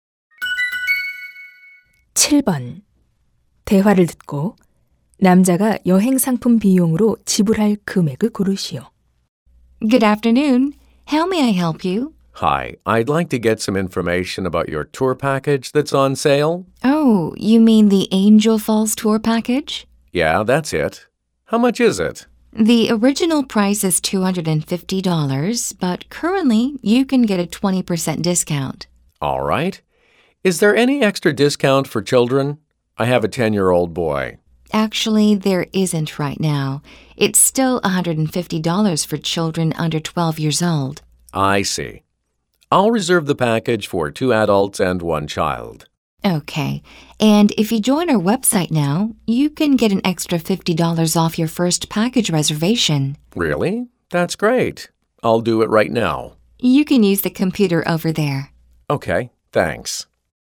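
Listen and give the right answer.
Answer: $500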